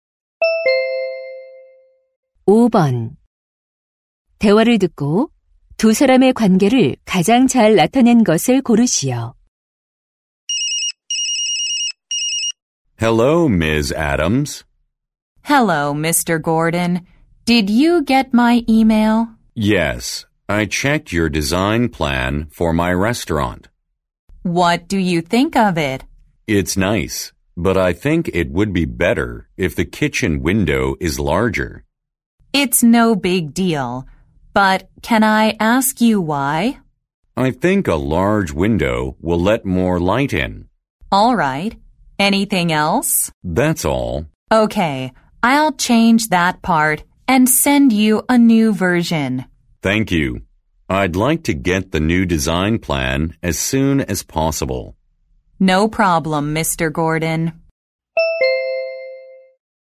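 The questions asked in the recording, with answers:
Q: 대화를 듣고 두 사람의 관계를 가장 잘 나타낸 것을 고르시오.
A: 식당 주인 - 인테리어 디자이너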